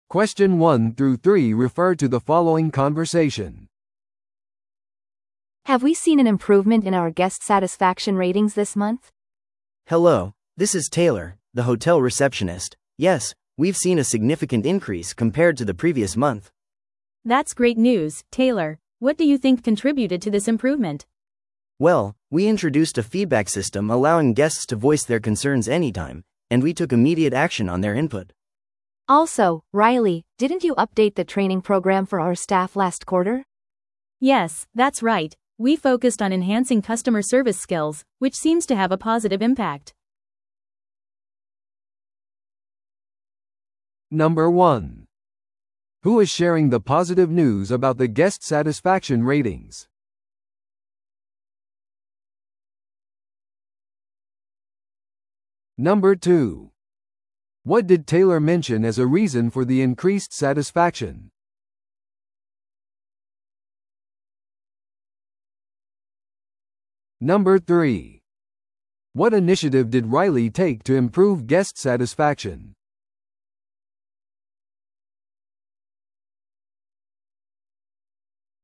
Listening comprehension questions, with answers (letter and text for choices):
Listen to the audio below and answer the questions.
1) Who is sharing the positive news about the guest satisfaction ratings?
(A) マーケティングマネージャー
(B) ホテルスタッフのトレーナー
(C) ホテルの受付係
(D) 話している誰か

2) What did Taylor mention as a reason for the increased satisfaction?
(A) ホテルの設備のアップグレード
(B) 新しいフィードバックシステム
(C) 室料の割引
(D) より多くの広告キャンペーン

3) What initiative did Riley take to improve guest satisfaction?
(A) ロイヤルティープログラムの導入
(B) ホテルのウェブサイトの更新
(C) ゲストルームの改装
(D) スタッフトレーニングプログラムの更新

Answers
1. (C) ホテルの受付係
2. (B) 新しいフィードバックシステム
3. (D) スタッフトレーニングプログラムの更新

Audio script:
A: Have we seen an improvement in our guest satisfaction ratings this month?
B: Hello, this is Taylor, the hotel receptionist. Yes, we've seen a significant increase compared to the previous month!
C: That's great news, Taylor. What do you think contributed to this improvement?
B: Well, we introduced a feedback system allowing guests to voice their concerns anytime, and we took immediate action on their input.
A: Also, Riley, didn't you update the training program for our staff last quarter?
C: Yes, that's right. We focused on enhancing customer service skills, which seems to have a positive impact.